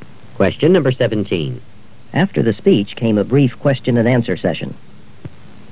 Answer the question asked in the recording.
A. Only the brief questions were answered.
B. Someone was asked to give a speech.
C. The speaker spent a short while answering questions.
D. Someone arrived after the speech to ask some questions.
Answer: C. The speaker spent a short while answering questions.

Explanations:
After the speech came a brief question-and-answer session.

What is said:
16. There ought to be more pencils than those left in the box.
17. After the speech came a brief question-and-answer session.